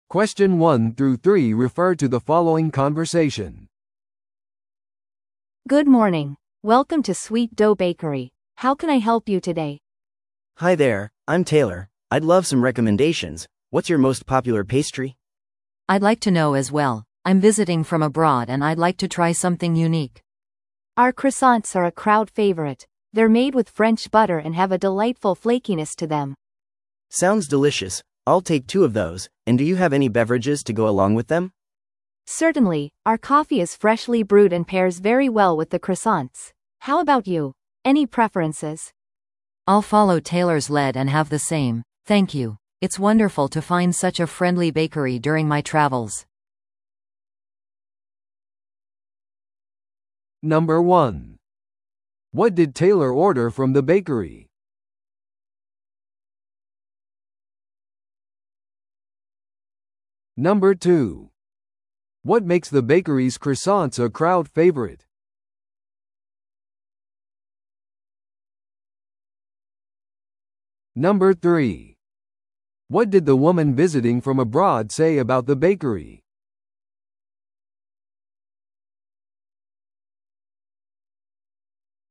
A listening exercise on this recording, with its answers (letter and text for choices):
Listen to the audio below and answer the questions.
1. What did Taylor order from the bakery?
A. 新鮮に淹れたコーヒー2杯。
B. バターをつけたフランスパンの1本。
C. 海外でしか手に入らない特別なペストリー。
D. クロワッサン2つと飲み物のおすすめ。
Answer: D. クロワッサン2つと飲み物のおすすめ。

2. What makes the bakery's croissants a crowd favorite?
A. ユニークなコーヒーブレンドが付いてくる。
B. 自家製ジャムが添えられている。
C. フランス産のバターを使用し、サクサクしている。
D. 地元の特別なレシピで作られている。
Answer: C. フランス産のバターを使用し、サクサクしている。

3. What did the woman visiting from abroad say about the bakery?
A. 地元の人には手に入らないものを求めた。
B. ベーカリーの親切な雰囲気を高く評価した。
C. 伝統的な地元のペストリーを試してみたかった。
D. 限られた選択肢に失望した。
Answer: B. ベーカリーの親切な雰囲気を高く評価した。

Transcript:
A: Good morning! Welcome to Sweet Dough Bakery. How can I help you today?
B: Hi there, I'm Taylor. I'd love some recommendations. What's your most popular pastry?
C: I'd like to know as well. I'm visiting from abroad and I'd like to try something unique!
A: Our croissants are a crowd favorite. They're made with French butter and have a delightful flakiness to them.
B: Sounds delicious! I'll take two of those, and do you have any beverages to go along with them?
A: Certainly, our coffee is freshly brewed and pairs very well with the croissants. How about you, any preferences?
C: I'll follow Taylor's lead and have the same, thank you. It's wonderful to find such a friendly bakery during my travels.